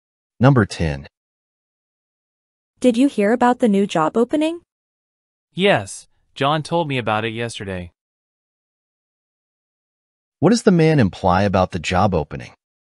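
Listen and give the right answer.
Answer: He already knew about it because John told him.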